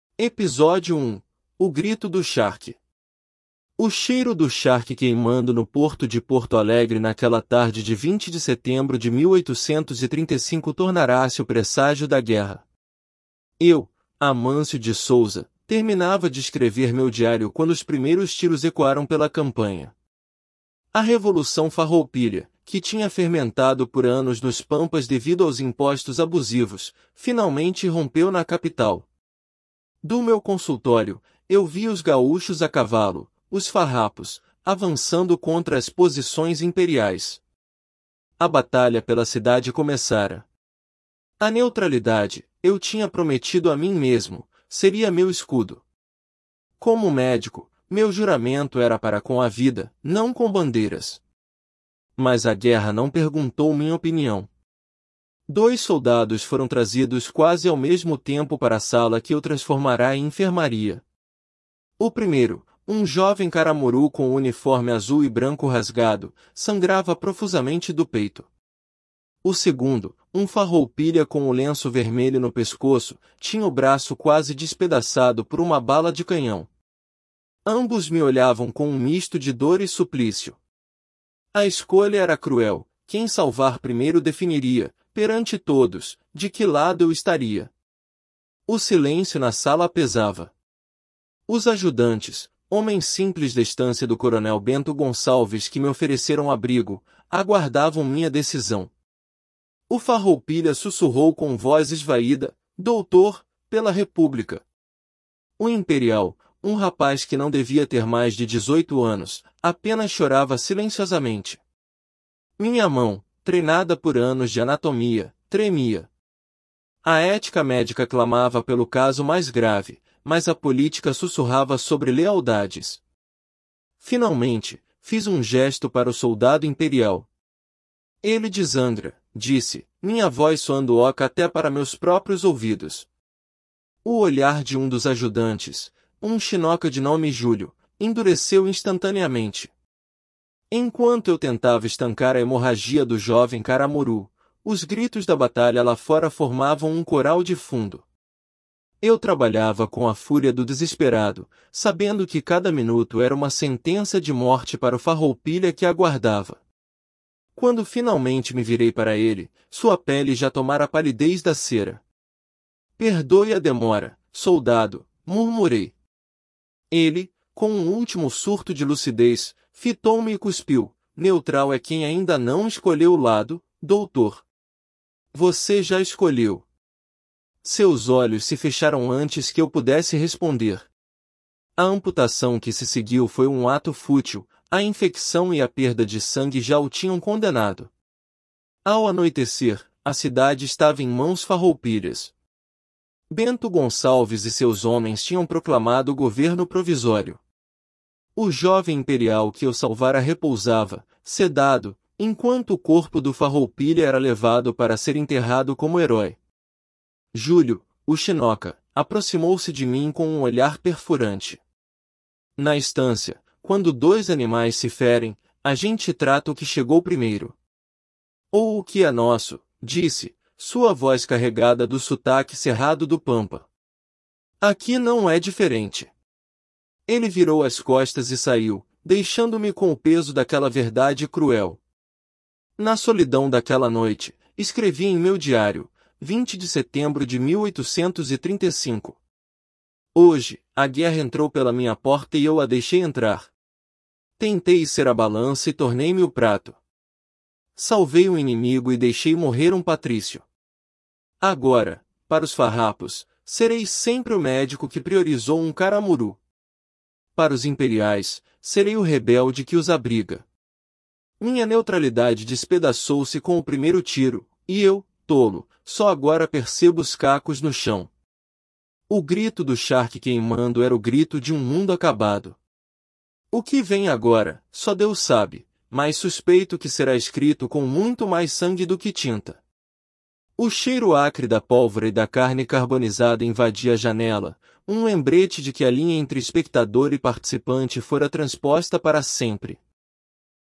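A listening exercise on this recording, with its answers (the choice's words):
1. Qual era a profissão do narrador e como isso influenciou sua postura inicial diante do conflito?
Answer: Era médico; por seu juramento com a vida, prometeu manter-se neutro.

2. Por que o cheiro do charque queimando é descrito como um 'presságio da guerra' no início do texto?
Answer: Porque a revolução nasceu dos impostos abusivos sobre o charque; queimá-lo anunciava a revolta.

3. Qual foi o dilema ético enfrentado pelo médico quando os dois soldados feridos foram trazidos?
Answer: Escolher quem salvar primeiro, o imperial ou o farroupilha, o que mostraria de que lado ele estava.

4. Como a reação do ajudante Júlio reflete os valores sociais e o contexto da guerra?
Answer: Ele condena a escolha: trata-se primeiro o que é nosso; a lealdade vale mais que a imparcialidade.

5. Qual é o significado da frase do soldado farroupilha moribundo: 'Neutral é quem ainda não escolheu lado, doutor. 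Você já escolheu.'?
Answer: Que ao tratar primeiro o imperial o médico tomou partido; a neutralidade é impossível.

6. Explique a metáfora usada pelo narrador em seu diário: 'Tentei ser a balança e tornei-me o prato.'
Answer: Quis ser o juiz neutro, mas acabou pesando de um dos lados, virando parte do conflito.

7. Qual era a principal causa da Revolução Farroupilha, conforme mencionada no texto?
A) Disputas religiosas entre gaúchos e o império.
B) Impostos abusivos cobrados pelo governo imperial.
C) A seca prolongada nos pampas que arruinou a pecuária.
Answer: Impostos abusivos cobrados pelo governo imperial.

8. O que o narrador estava fazendo quando os primeiros tiros ecoaram?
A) Examinando um paciente em seu consultório.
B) Terminando de escrever em seu diário.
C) Observando o movimento no porto de Porto Alegre.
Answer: Terminando de escrever em seu diário.

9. Qual critério médico o narrador afirma ter seguido para escolher tratar primeiro o soldado imperial?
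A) A gravidade do ferimento (ele 'desangrava').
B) A idade mais jovem do soldado.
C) A ordem de chegada dos feridos.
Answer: A gravidade do ferimento (ele 'desangrava').

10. Qual foi a consequência imediata da batalha descrita no texto para a cidade de Porto Alegre?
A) A cidade foi destruída e abandonada.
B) A cidade ficou sob controle das tropas imperiais.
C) A cidade ficou sob controle farroupilha, que proclamou um governo provisório.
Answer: A cidade ficou sob controle farroupilha, que proclamou um governo provisório.

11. Qual é o tom predominante da última entrada do diário do narrador?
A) De triunfo e esperança no futuro.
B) De amarga reflexão e desilusão.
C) De indiferença e aceitação resignada.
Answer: De amarga reflexão e desilusão.

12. O que o cheiro final de 'pólvora e carne carbonizada' representa para o narrador?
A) A promessa de uma rápida vitória farroupilha.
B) Um lembrete de que ele cruzou a linha de espectador para participante.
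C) A confirmação de que sua neutralidade foi mantida com sucesso.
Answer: Um lembrete de que ele cruzou a linha de espectador para participante.

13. O narrador, Amâncio de Souza, conseguiu salvar a vida do soldado farroupilha após tratar o soldado imperial.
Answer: Falso

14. O soldado imperial ferido era um homem maduro e experiente.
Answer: Falso

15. A ação se passa durante a tomada de Porto Alegre no início da Revolução Farroupilha.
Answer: Verdadeiro

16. O ajudante Júlio aprovou a decisão do médico de tratar primeiro o soldado imperial.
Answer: Falso

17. O narrador acredita que sua neutralidade foi destruída no momento em que a guerra começou, não apenas quando ele tomou sua decisão.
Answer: Verdadeiro

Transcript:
Episódio 1: O Grito do Charque – TEST
O cheiro do charque queimando no porto de Porto Alegre naquela tarde de 20 de setembro de 1835 tornara-se o presságio da guerra. 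Eu, Amâncio de Souza, terminava de escrever meu diário quando os primeiros tiros ecoaram pela campanha. A Revolução Farroupilha, que tinha fermentado por anos nos pampas devido aos impostos abusivos, finalmente irrompeu na capital. Do meu consultório, eu via os gaúchos a cavalo, os farrapos, avançando contra as posições imperiais. A batalha pela cidade começara.
A neutralidade, eu tinha prometido a mim mesmo, seria meu escudo. Como médico, meu juramento era para com a vida, não com bandeiras. Mas a guerra não perguntou minha opinião. Dois soldados foram trazidos quase ao mesmo tempo para a sala que eu transformara em enfermaria. O primeiro, um jovem caramuru com o uniforme azul e branco rasgado, sangrava profusamente do peito. O segundo, um farroupilha com o lenço vermelho no pescoço, tinha o braço quase despedaçado por uma bala de canhão. Ambos me olhavam com um misto de dor e suplício. 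A escolha era cruel: quem salvar primeiro definiria, perante todos, de que lado eu estaria.
O silêncio na sala pesava. Os ajudantes, homens simples da estância do coronel Bento Gonçalves que me ofereceram abrigo, aguardavam minha decisão. O farroupilha sussurrou com voz esvaída: 'Doutor... pela República...'. O imperial, um rapaz que não devia ter mais de dezoito anos, apenas chorava silenciosamente. Minha mão, treinada por anos de anatomia, tremia. A ética médica clamava pelo caso mais grave, mas a política sussurrava sobre lealdades. Finalmente, fiz um gesto para o soldado imperial. 'Ele desangra', disse, minha voz soando oca até para meus próprios ouvidos. O olhar de um dos ajudantes, um chinoca de nome Júlio, endureceu instantaneamente.
Enquanto eu tentava estancar a hemorragia do jovem caramuru, os gritos da batalha lá fora formavam um coral de fundo. Eu trabalhava com a fúria do desesperado, sabendo que cada minuto era uma sentença de morte para o farroupilha que aguardava. 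Quando finalmente me virei para ele, sua pele já tomara a palidez da cera. 'Perdoe a demora, soldado', murmurei. Ele, com um último surto de lucidez, fitou-me e cuspiu: 'Neutral é quem ainda não escolheu lado, doutor. Você já escolheu.' Seus olhos se fecharam antes que eu pudesse responder. A amputação que se seguiu foi um ato fútil; a infecção e a perda de sangue já o tinham condenado.
Ao anoitecer, a cidade estava em mãos farroupilhas. Bento Gonçalves e seus homens tinham proclamado o governo provisório. O jovem imperial que eu salvara repousava, sedado, enquanto o corpo do farroupilha era levado para ser enterrado como herói. Júlio, o chinoca, aproximou-se de mim com um olhar perfurante. 'Na estância, quando dois animais se ferem, a gente trata o que chegou primeiro. Ou o que é nosso', disse, sua voz carregada do sotaque cerrado do pampa. 'Aqui não é diferente.' Ele virou as costas e saiu, deixando-me com o peso daquela verdade cruel.
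Na solidão daquela noite, escrevi em meu diário: '20 de setembro de 1835. Hoje, a guerra entrou pela minha porta e eu a deixei entrar. Tentei ser a balança e tornei-me o prato. Salvei um inimigo e deixei morrer um patrício. Agora, para os farrapos, serei sempre o médico que priorizou um caramuru. Para os imperiais, serei o rebelde que os abriga. Minha neutralidade despedaçou-se com o primeiro tiro, e eu, tolo, só agora percebo os cacos no chão. O grito do charque queimando era o grito de um mundo acabado. O que vem agora, só Deus sabe, mas suspeito que será escrito com muito mais sangue do que tinta.' O cheiro acre da pólvora e da carne carbonizada invadia a janela, um lembrete de que a linha entre espectador e participante fora transposta para sempre.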